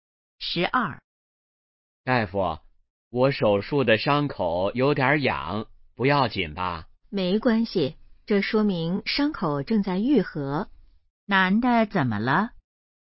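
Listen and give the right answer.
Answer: 手术伤口有点痒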